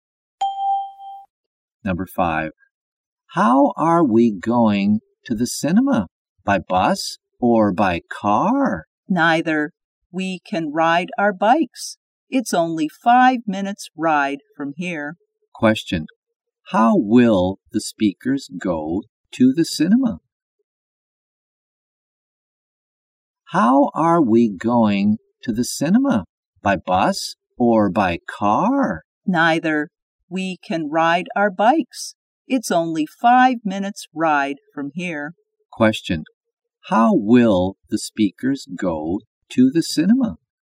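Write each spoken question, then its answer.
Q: How will the speakers go to the cinema?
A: By bike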